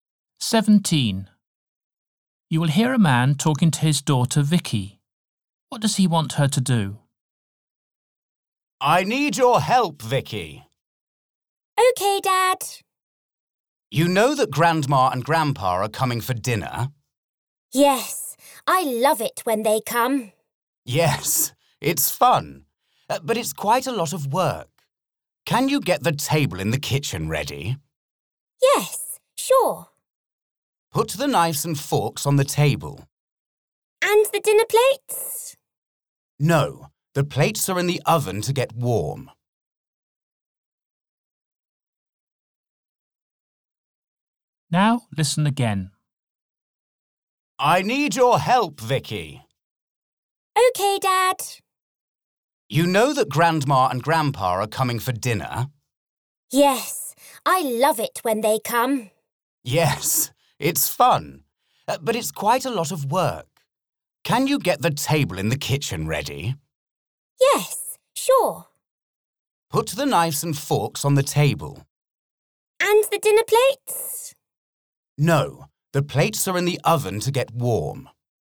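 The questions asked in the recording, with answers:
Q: What does he want her to do?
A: Put the knives and forks on the kitchen table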